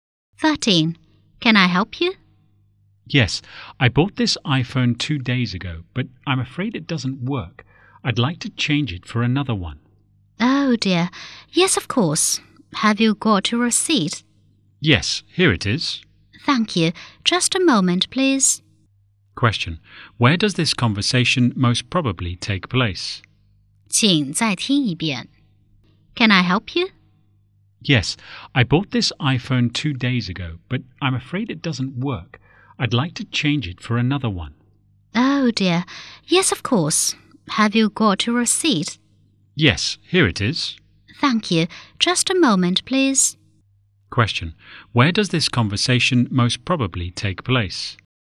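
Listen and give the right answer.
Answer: In a shop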